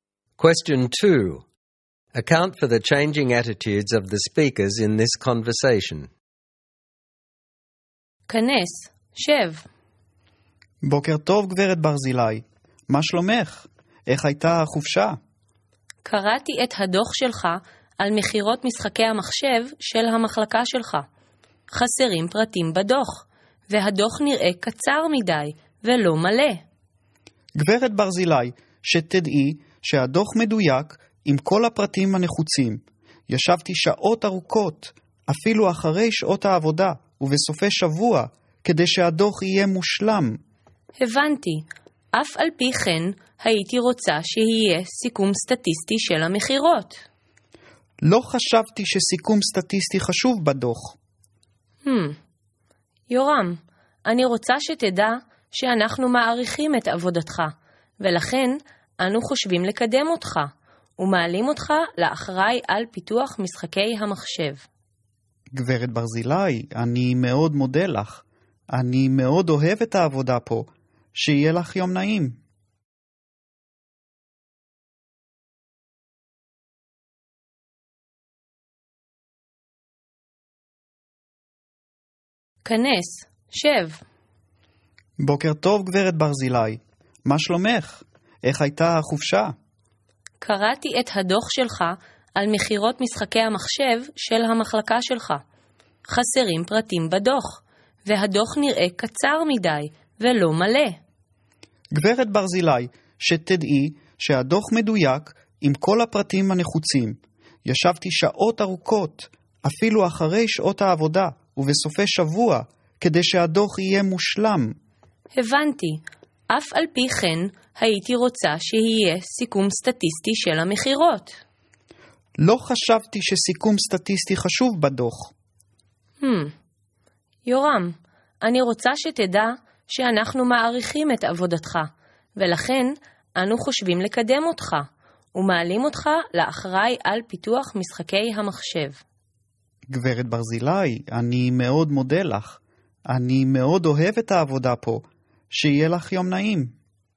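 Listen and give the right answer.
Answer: Mrs Barzilai starts off critical, saying the report is too short and incomplete, and Yoram gets defensive, saying he worked long hours on it. Then she says they value his work and promotes him to head of computer game development, so he becomes grateful and happy.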